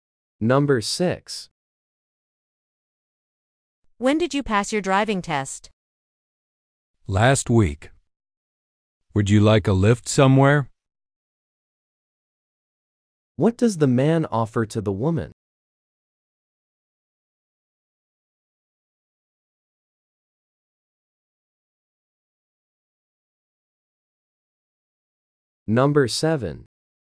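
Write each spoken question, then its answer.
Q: What does the man offer to the woman?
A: A lift (a ride) somewhere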